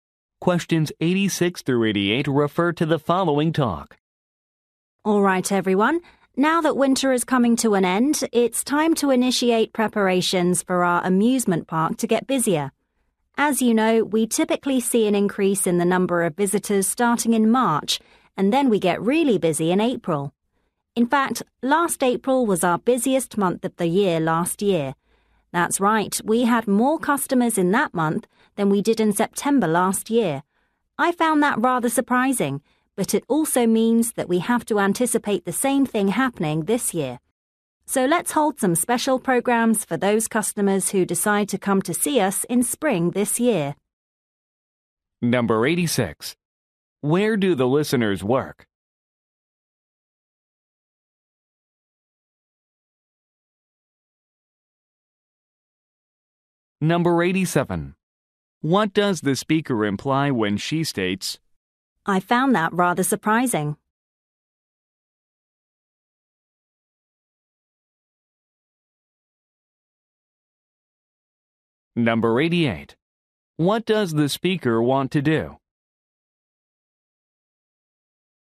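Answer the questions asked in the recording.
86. At an amusement park
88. Hold special programs for spring customers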